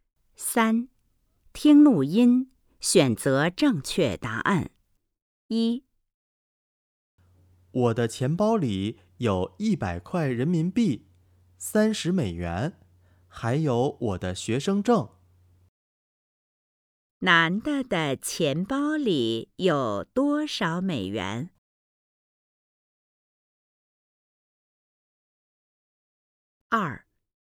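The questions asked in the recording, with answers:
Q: 男的的钱包里有多少美元?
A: 30美元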